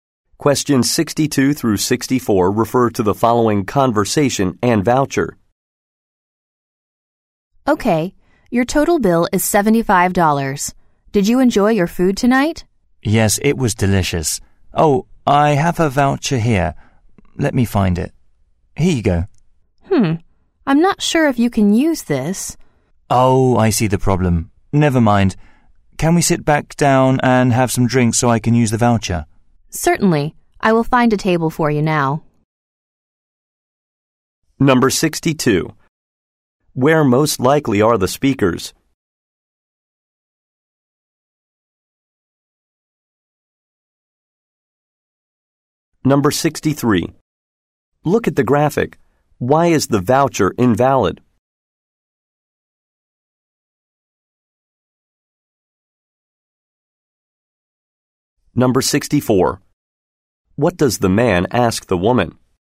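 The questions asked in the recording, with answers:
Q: Where most likely are the speakers?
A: At a restaurant

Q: What does the man ask the woman?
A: If they can sit back down and have some drinks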